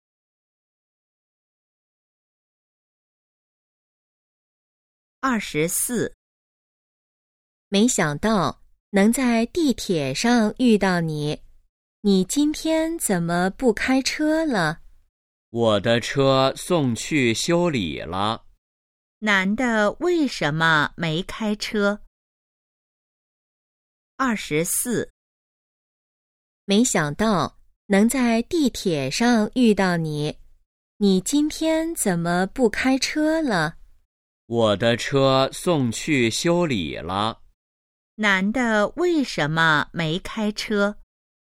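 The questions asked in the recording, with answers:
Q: 男的为什么没开车?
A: 车送去修理了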